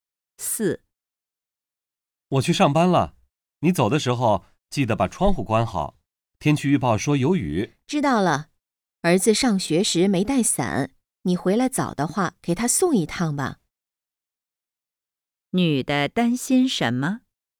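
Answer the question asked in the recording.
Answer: 儿子没带伞,会被雨淋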